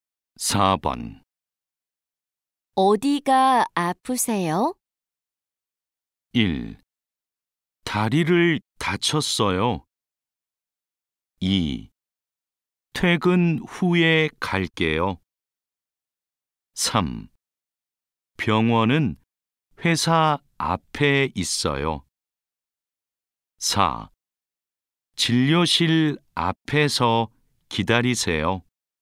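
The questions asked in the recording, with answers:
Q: 어디가 아프세요?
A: 1: 다리를 다쳤어요.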